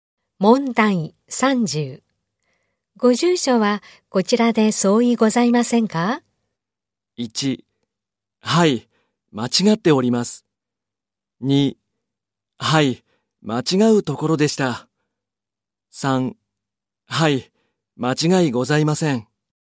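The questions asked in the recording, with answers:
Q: ご住所はこちらで相違ございませんか?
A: 3: はい、間違いございません。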